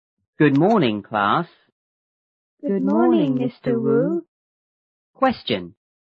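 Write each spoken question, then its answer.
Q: What is Mr. Wu's job?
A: A teacher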